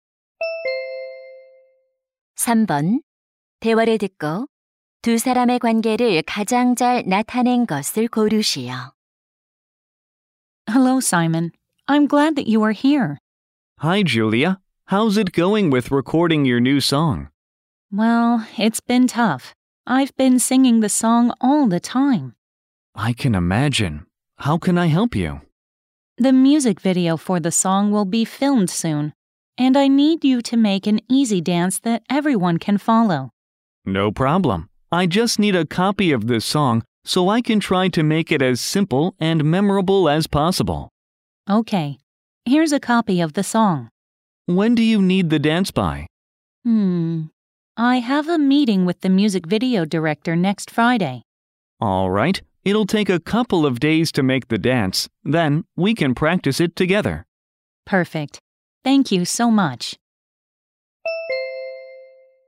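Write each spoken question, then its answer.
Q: 대화를 듣고 두 사람의 관계를 가장 잘 나타낸 것을 고르시오.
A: 가수 - 안무가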